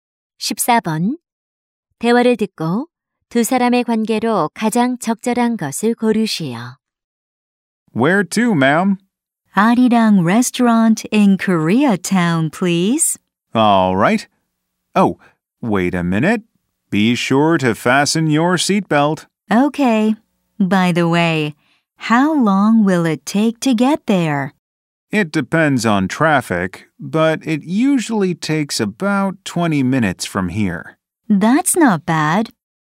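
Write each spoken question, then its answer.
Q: 대화를 듣고 두 사람의 관계로 가장 적절한 것을 고르시오.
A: 택시 기사 - 승객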